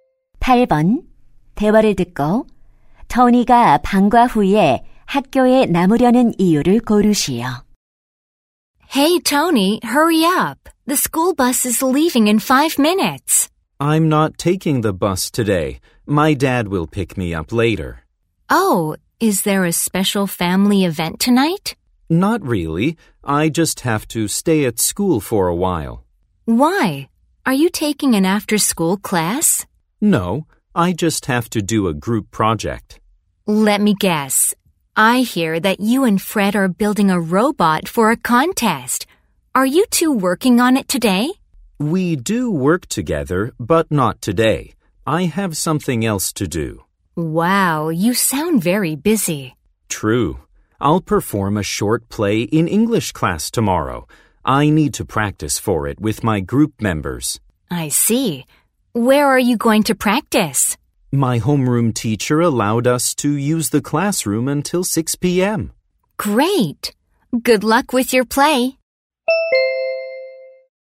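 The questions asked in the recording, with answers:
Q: 대화를 듣고 토니가 방과 후에 학교에 남으려는 이유를 고르시오.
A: 영어 수업 연극을 모둠원들과 연습하려고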